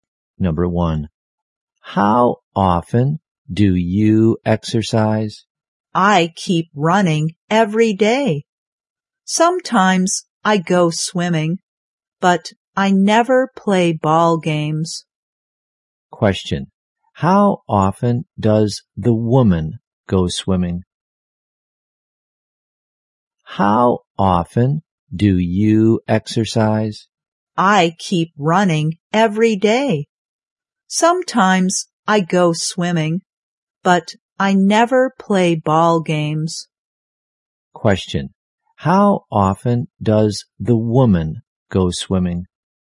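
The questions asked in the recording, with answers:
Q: how often does the woman go swimming?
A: Sometimes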